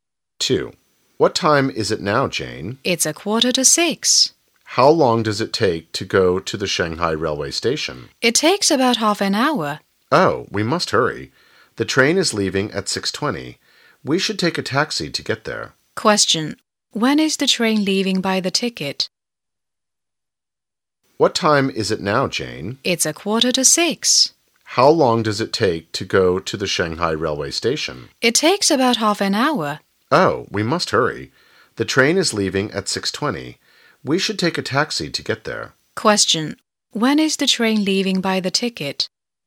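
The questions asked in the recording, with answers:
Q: When is the train leaving by the ticket?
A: At 6:20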